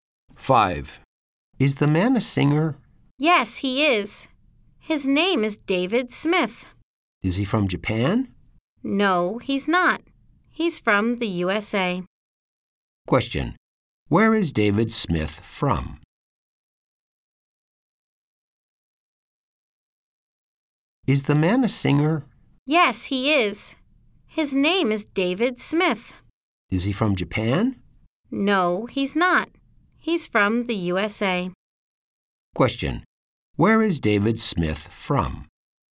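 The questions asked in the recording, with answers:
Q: Where is David Smith from?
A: The USA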